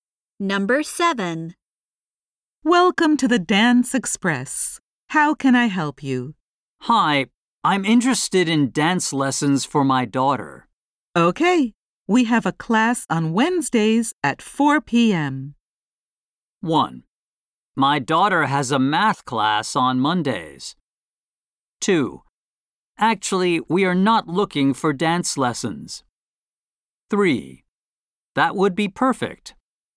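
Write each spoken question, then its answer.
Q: Okay, we have a class on Wednesdays at 4 p.m.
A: 3: That would be perfect.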